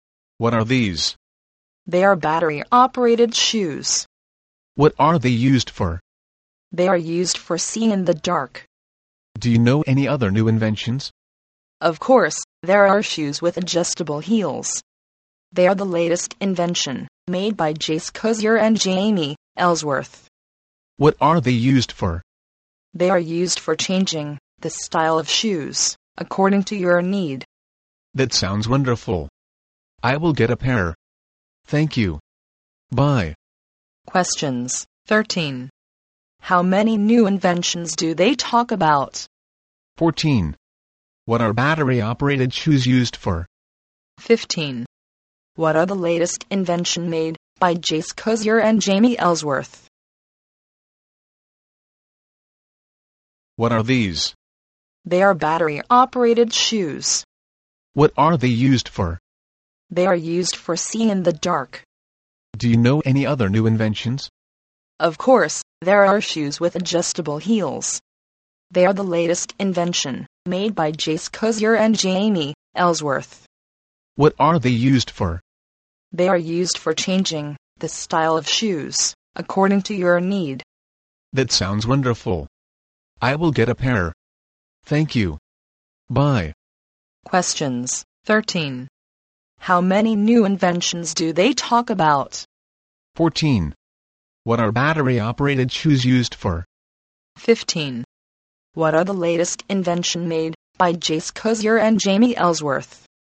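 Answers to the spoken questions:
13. Two
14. Seeing in the dark
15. Shoes with adjustable heels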